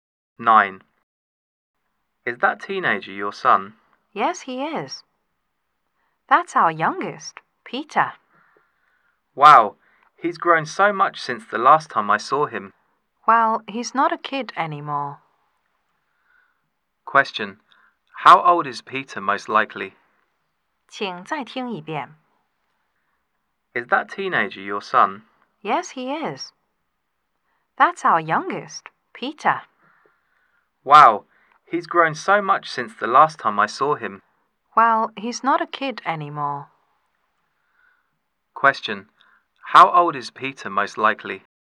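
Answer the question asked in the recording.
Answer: He is a teenager.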